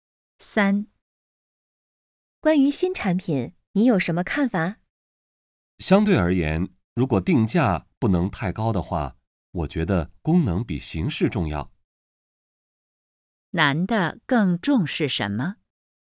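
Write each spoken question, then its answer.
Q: 男的更重视什么?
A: 功能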